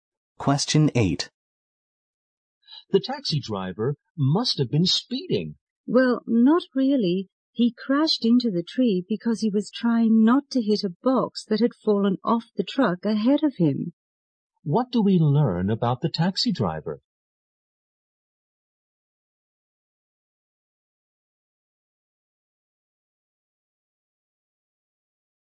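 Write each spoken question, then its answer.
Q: What do we learn about the taxi driver?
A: He crashed into a tree trying to avoid a box that fell off a truck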